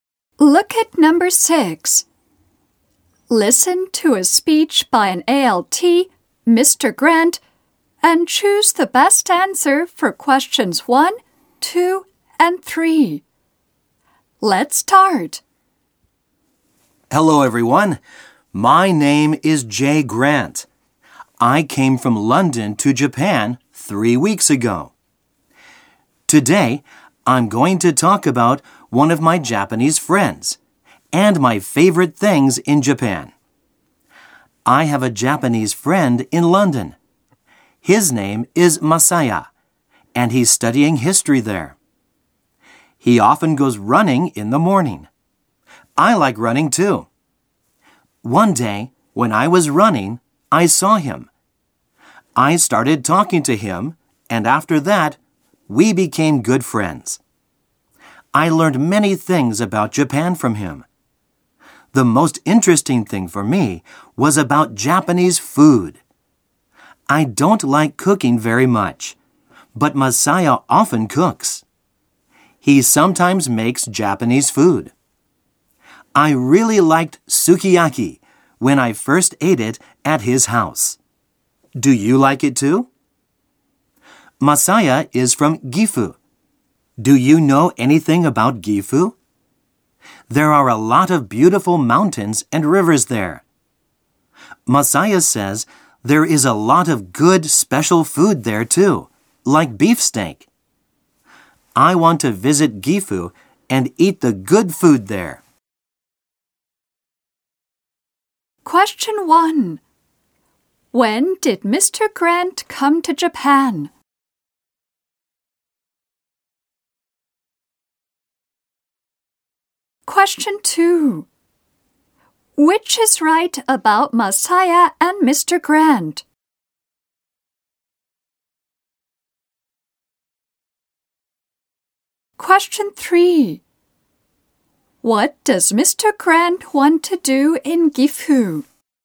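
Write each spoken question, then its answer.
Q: When did Mr. Grant come to Japan?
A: Three weeks ago.

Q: What does Mr. Grant want to do in Gifu?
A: Eat the good food there.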